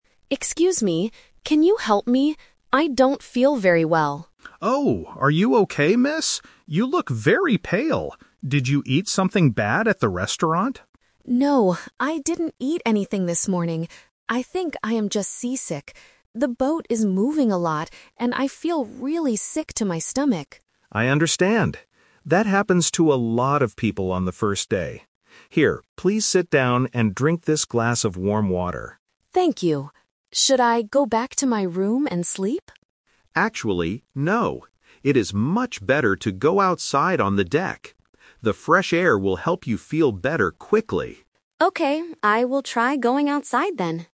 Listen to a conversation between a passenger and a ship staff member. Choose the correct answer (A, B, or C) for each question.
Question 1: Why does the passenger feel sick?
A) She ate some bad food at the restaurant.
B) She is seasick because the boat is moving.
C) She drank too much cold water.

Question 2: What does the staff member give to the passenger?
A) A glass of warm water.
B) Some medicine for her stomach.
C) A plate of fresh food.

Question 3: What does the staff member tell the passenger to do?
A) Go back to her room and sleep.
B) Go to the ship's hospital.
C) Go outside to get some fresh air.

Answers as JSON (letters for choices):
{"1": "B", "2": "A", "3": "C"}

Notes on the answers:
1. The passenger clearly says, "I think I am just seasick. The boat is moving a lot..." The Trap: Option A is a trap. The staff asks, "Did you eat something bad at the restaurant?" but the passenger says "No". Option C is a plausible guess in real life, but it is not mentioned in the audio.
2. The staff member tells her, "drink this glass of warm water." The Trap: Option B is a plausible thing to give a sick person, but it is never mentioned in the audio. Option C is a trap because the restaurant is mentioned, but she did not eat anything.
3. Option A is the A2 "Twist" trap. The passenger wants to go back to her room and sleep ("Should I go back to my room and sleep?"), but the staff member says "Actually, no." Option B is a plausible action, but it is not mentioned in the dialogue.

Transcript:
Passenger: Excuse me. Can you help me? I don't feel very well.
Staff: Oh, are you okay, miss? You look very pale. Did you eat something bad at the restaurant?
Passenger: No, I didn't eat anything this morning. I think I am just seasick. The boat is moving a lot, and I feel really sick to my stomach.
Staff: I understand. That happens to a lot of people on the first day. Here, please sit down and drink this glass of warm water.
Passenger: Thank you. Should I go back to my room and sleep?
Staff: Actually, no. It is much better to go outside on the deck. The fresh air will help you feel better quickly.